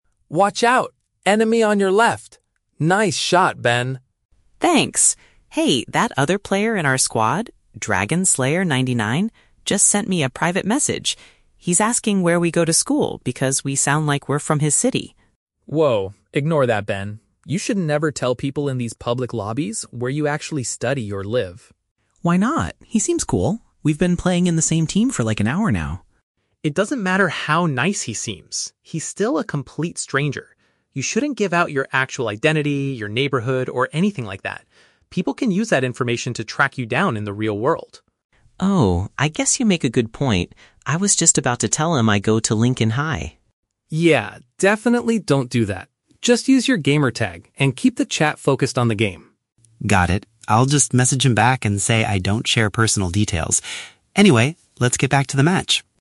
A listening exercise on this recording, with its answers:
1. Why does Alex warn Ben during their game?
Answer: Ben is about to share private information with an unknown player.

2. What exactly did the stranger ask Ben about?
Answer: The specific educational institution he attends.

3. What is Ben's final decision regarding the stranger's message?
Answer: He will tell the player that he refuses to answer the question.

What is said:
Alex: Watch out, enemy on your left! Nice shot, Ben.
Ben: Thanks! Hey, that other player in our squad, "DragonSlayer99", just sent me a private message. He's asking where we go to school because we sound like we're from his city.
Alex: Whoa, ignore that, Ben. You should never tell people in these public lobbies where you actually study or live.
Ben: Why not? He seems cool. We've been playing in the same team for like an hour now.
Alex: It doesn't matter how nice he seems; he's still a complete stranger. You shouldn't give out your actual identity, your neighborhood, or anything like that. People can use that information to track you down in the real world.
Ben: Oh, I guess you make a good point. I was just about to tell him I go to Lincoln High.
Alex: Yeah, definitely don't do that. Just use your gamer tag and keep the chat focused on the game.
Ben: Got it. I'll just message him back and say I don't share personal details. Anyway, let's get back to the match!